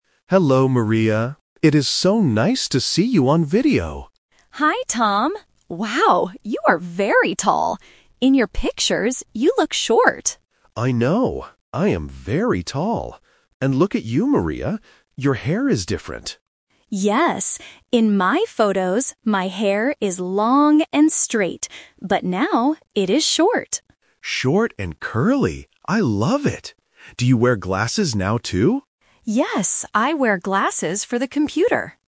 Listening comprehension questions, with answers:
Listen to the conversation and choose the correct answer (A, B, or C).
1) What does Tom look like in real life?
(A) He is short.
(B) He is very tall.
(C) He is old.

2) What kind of hair does Maria have NOW?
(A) Long and straight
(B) Long and curly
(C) Short and curly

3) What does Maria wear for the computer?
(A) Glasses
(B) A hat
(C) A blue shirt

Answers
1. (B) He is very tall.
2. (C) Short and curly
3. (A) Glasses

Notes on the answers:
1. Maria says "Wow, you are very tall" and Tom confirms by saying "I am very tall." Why the trap is wrong: Option (A) He is short is a trap. Maria says he looks short "in your pictures", but in real life, he is tall. Option (C) He is old is not mentioned in the audio.
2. Maria says her hair is now "short", and Tom adds that it is "Short and curly!" Why the trap is wrong: Option (A) Long and straight is a trap because this is how her hair looked in her old photos, not now. Option (B) Long and curly is a mix of the old and new hairstyles.
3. Tom asks if she wears glasses, and Maria answers, "Yes, I wear glasses for the computer." Why the trap is wrong: Options (B) and (C) are common clothing items but they are not mentioned in this conversation at all.

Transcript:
Tom: Hello, Maria! It is so nice to see you on video.
Maria: Hi, Tom! Wow, you are very tall. In your pictures, you look short.
Tom: I know! I am very tall. And look at you, Maria. Your hair is different.
Maria: Yes. In my photos, my hair is long and straight. But now, it is short.

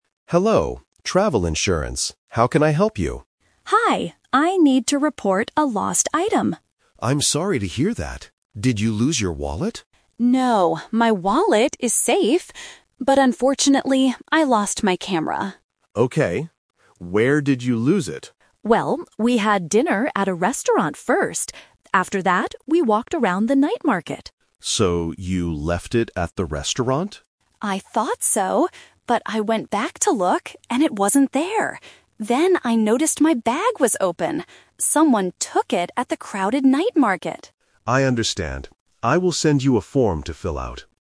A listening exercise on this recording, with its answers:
Listen to a phone conversation between a tourist and an insurance agent. Choose the correct answer (A, B, or C) for each question.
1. What item did the tourist lose?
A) A wallet.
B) A camera.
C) A passport.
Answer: B) A camera.

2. Where did the tourist actually lose the item?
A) At a restaurant.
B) At a hotel.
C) At the night market.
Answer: C) At the night market.

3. What did the tourist notice about the bag?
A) It was open.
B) It was very heavy.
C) It was left at the restaurant.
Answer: A) It was open.

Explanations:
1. The tourist clearly states, "...unfortunately, I lost my camera." Option A is the trap: the agent asks, "Did you lose your wallet?" but the tourist says it is safe. Option C is a plausible travel item but is never mentioned.
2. The tourist explains, "Someone took it at the crowded night market." Option A is the trap: the agent asks if they left it at the restaurant, and the tourist "thought so" at first, but it wasn't there. Option B is not mentioned in the audio.
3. The tourist says, "Then I noticed my bag was open." Option C is the trap: the restaurant is where they went to look for the camera, not where they left the bag. Option B is plausible but not mentioned.

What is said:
Agent: Hello, Travel Insurance. How can I help you?
Tourist: Hi, I need to report a lost item.
Agent: I'm sorry to hear that. Did you lose your wallet?
Tourist: No, my wallet is safe. But unfortunately, I lost my camera.
Agent: Okay. Where did you lose it?
Tourist: Well, we had dinner at a restaurant first. After that, we walked around the night market.
Agent: So you left it at the restaurant?
Tourist: I thought so! But I went back to look, and it wasn't there. Then I noticed my bag was open. Someone took it at the crowded night market.

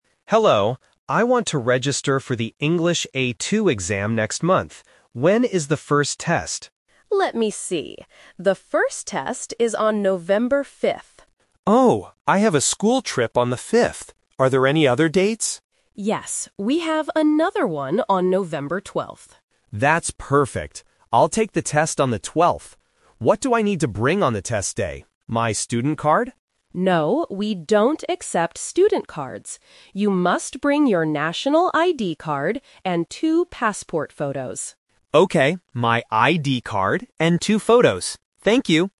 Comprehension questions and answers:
Listen to the conversation and circle the correct answer (A, B, or C).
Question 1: When will Tom take the English exam?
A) On November 5th.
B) On November 12th.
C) Next weekend.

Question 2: Why can't Tom take the first test?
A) Because the test is full.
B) Because he lost his ID card.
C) Because he has a school trip.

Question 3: What must Tom bring to the test?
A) His national ID card and two photos.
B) His student card and two photos.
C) A pen and a notebook.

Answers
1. B) On November 12th.
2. C) Because he has a school trip.
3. A) His national ID card and two photos.

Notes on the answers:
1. Tom agrees to the second date by saying, "That's perfect. I'll take the test on the 12th." Why the trap is wrong: Option (A) is the trap (The Twist). The staff offers November 5th first, but Tom cannot take it. Option (C) was not mentioned.
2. Tom explicitly states his reason for not taking the test on the 5th: "Oh, I have a school trip on the 5th." Why the trap is wrong: Option (B) is a trap. The ID card is mentioned later in the audio, but it is not the reason he rejects the first date. Option (A) is a plausible guess but was not mentioned.
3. The staff tells him exactly what to bring: "You must bring your national ID card and two passport photos." Why the trap is wrong: Option (B) is the trap. Tom asks if he should bring his student card, but the staff says, "No, we don't accept student cards." Option (C) is a plausible guess for a test but was not mentioned.

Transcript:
Tom: Hello, I want to register for the English A2 exam next month. When is the first test?
Staff: Let me see. The first test is on November 5th.
Tom: Oh, I have a school trip on the 5th. Are there any other dates?
Staff: Yes, we have another one on November 12th.
Tom: That's perfect. I'll take the test on the 12th. What do I need to bring on the test day? My student card?
Staff: No, we don't accept student cards. You must bring your national ID card and two passport photos.
Tom: Okay, my ID card and two photos. Thank you!

